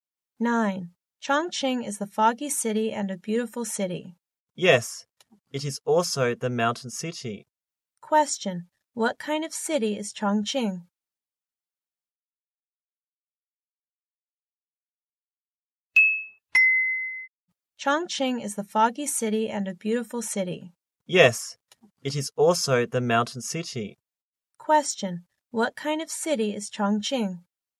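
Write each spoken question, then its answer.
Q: What kind of city is Chongqing?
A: A foggy, beautiful mountain city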